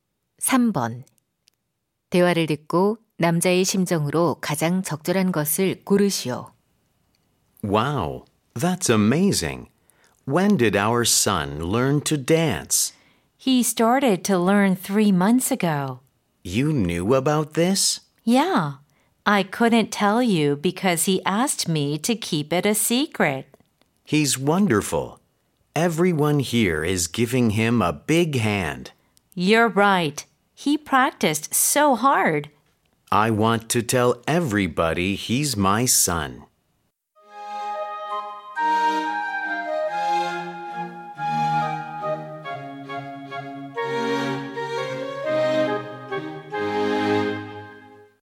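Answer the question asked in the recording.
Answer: 자랑스러움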